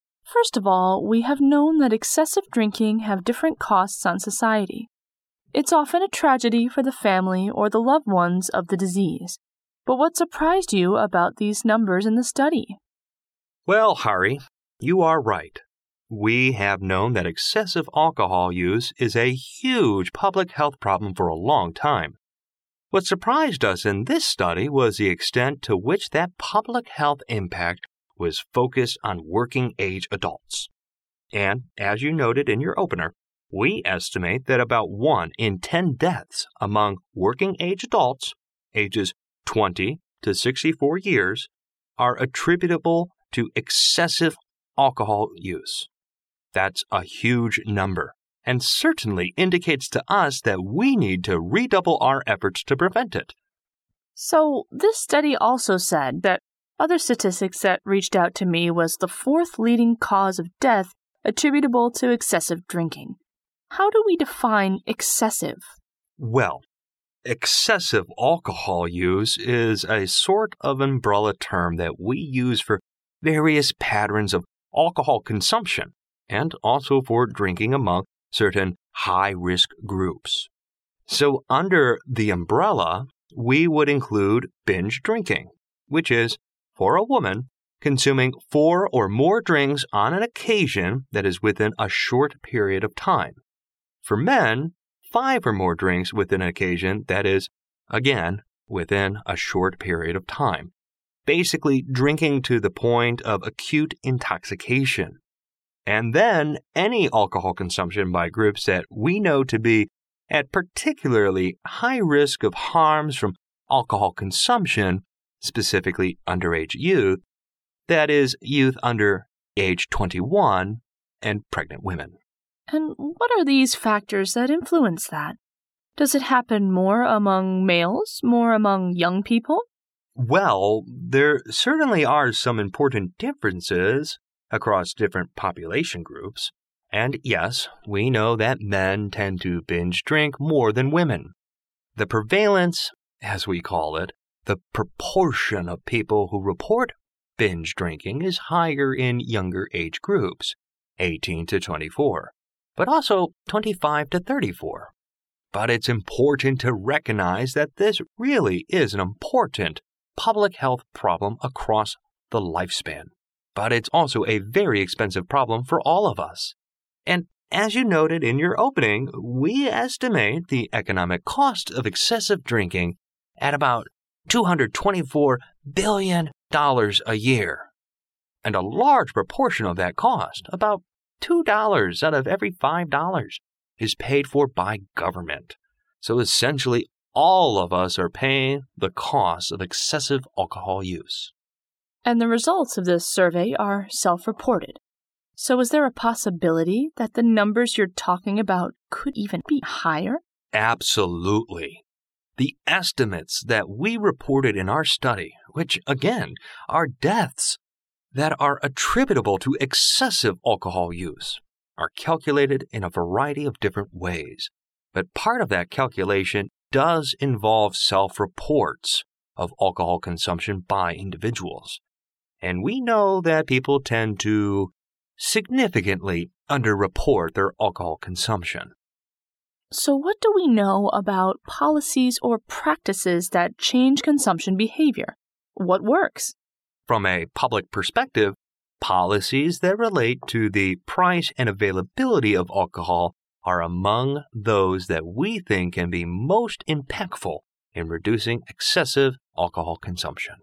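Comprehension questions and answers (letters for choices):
Directions:Each conversation will be read only once. At the end of each conversation, there will be a one-minute pause. During the pause, read the four choices marked A, B, C and D, and decide which is the best answer or complete the following sentences with one word according to what you hear.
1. What mentioned as the surprising fact in the study?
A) Society suffers a great deal as a result of excessive alcohol consumption.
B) Working-age adults are greatly impacted by excessive alcohol consumption.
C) Pregnant women have excessive alcohol consumption problems.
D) Many people nowadays start to drink alcohol at a very young age.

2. Who are said to be at a particularly high risk of harms from alcohol consumption?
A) People with chronic diseases.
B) Blue-collar workers.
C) Underage youth.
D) Working women.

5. What does "binge-drinking" in the conversation most probably mean?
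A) Free drinking.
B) Expensive drinking.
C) Moderate drinking.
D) Excessive drinking.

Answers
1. B
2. C
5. D

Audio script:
Reporter (R): First of all, we have known that excessive drinking has different costs on society. It's often a tragedy for the family or the loved ones of the disease, but what surprised you about these numbers in the study?
Interviewee (I): Well, Hari, you are right, we have known that excessive alcohol use is a huge public health problem for a long time. What surprised us in this study was the extent to which that public health impact was focused on working-age adults. And as you noted in your opener, we estimate that about one in 10 deaths among working-age adults, ages 20-64 years, are attributable to excessive alcohol use. That's a huge number and certainly indicates to us that we need to redouble our efforts to prevent it.
R: So this study also said that—other statistic that reached out to me was the fourth leading cause of death attributable to excessive drinking. 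How do we define excessive?
I: Well, excessive alcohol use is a sort of an umbrella term that we use for various patterns of alcohol consumption and also for drinking among certain high-risk groups. So under the umbrella, we would include binge-drinking, which is, for a woman, consuming four or more drinks on an occasion that is within a short period of time, for men, five or more drinks within an occasion that is again within a short period of time, basically drinking to the point of acute intoxication. And then any alcohol consumption by groups that we know to be at particularly high risk of harms from alcohol consumption, specifically underage youth, that is youth under age 21, and pregnant women.
R: And what are these factors that influence that? Does it happen more among males, more among young people?
I: Well, there certainly are some important differences across different population groups. 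And yes, we know that men tend to binge-drink more than women. The prevalence, as we call it, the proportion of people who report binge-drinking is higher in younger-age groups, 18-24, but also 25-34. But it's important to recognize that this really is an important public health problem across the lifespan. But it's also a very expensive problem for all of us. And, as you noted in your opening, we estimate the economic cost of excessive drinking at about $224 billion a year. And a large proportion of that cost, about $2 out of every $5, is paid for by government. So, essentially, all of us are paying the cost of excessive alcohol use.
R: And the results of this survey are self-reported. So is there a possibility that the numbers you're talking about could even be higher?
I: Absolutely. The estimates that we reported in our study, which, again, are deaths that are attributable to excessive alcohol use, are calculated in a variety of different ways, but part of that calculation does involve self-reports of alcohol consumption by individuals. 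And we know that people tend to significantly under-report their alcohol consumption.
R: So what do we know about policies or practices that change consumption behavior? What works?
I: From a public perspective, policies that relate to the price and availability of alcohol are among those that we think can be most impactful in reducing excessive alcohol consumption.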